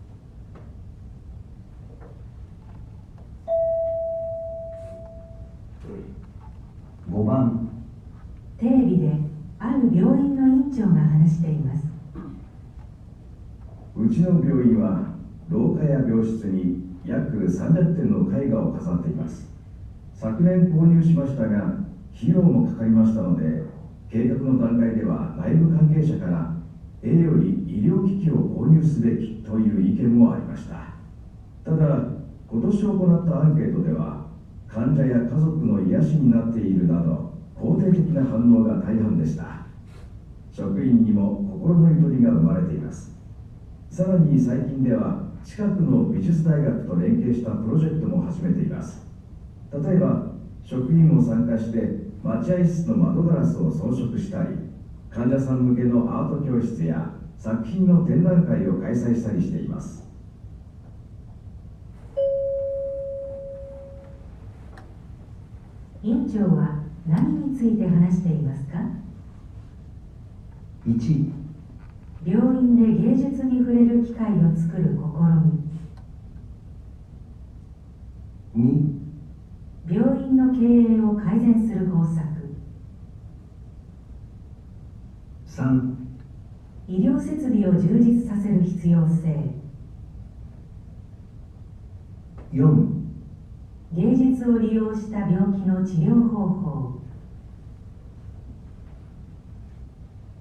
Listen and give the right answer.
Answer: 1

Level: N1 Listening · Test 2